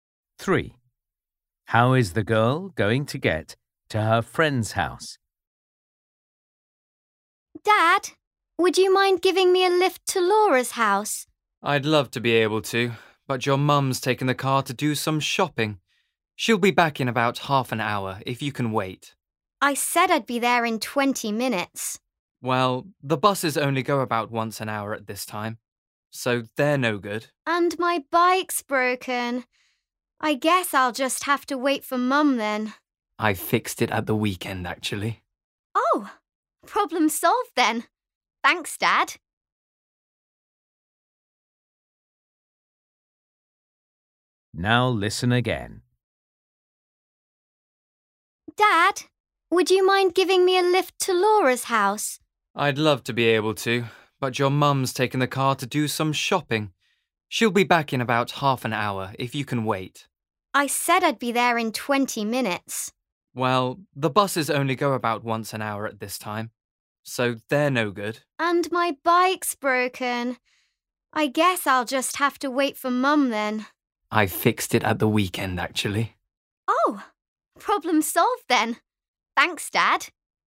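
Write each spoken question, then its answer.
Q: How is the girl going to get to her friend's house?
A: by bike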